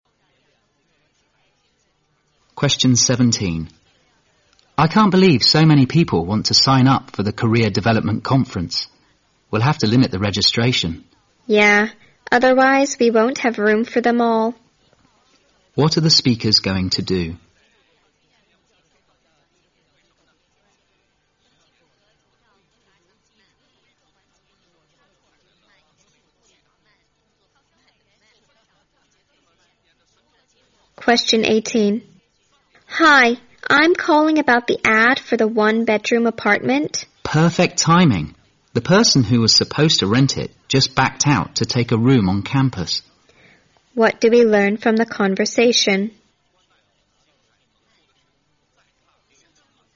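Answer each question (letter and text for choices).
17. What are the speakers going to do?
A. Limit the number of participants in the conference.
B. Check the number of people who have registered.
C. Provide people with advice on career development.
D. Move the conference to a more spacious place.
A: A. Limit the number of participants in the conference.

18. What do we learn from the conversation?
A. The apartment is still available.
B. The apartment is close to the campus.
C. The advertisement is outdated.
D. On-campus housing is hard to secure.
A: A. The apartment is still available.

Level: 六级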